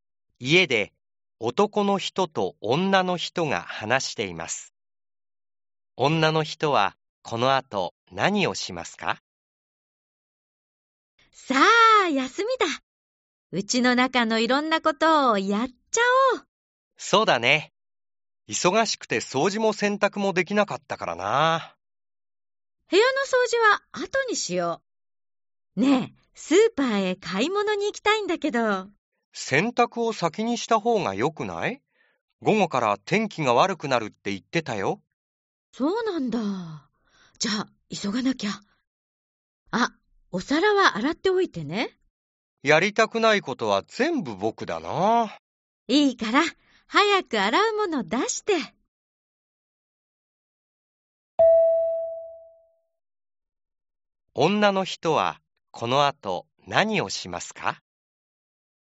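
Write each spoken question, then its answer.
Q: 女の人はこの後何をしますか?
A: 洗濯をする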